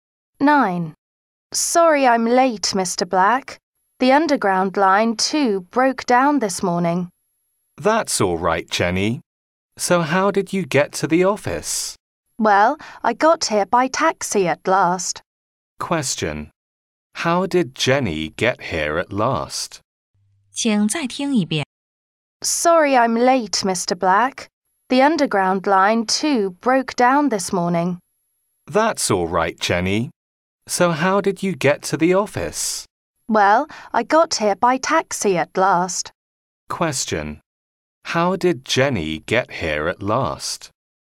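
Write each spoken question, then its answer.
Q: How did Jenny get here at last?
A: By taxi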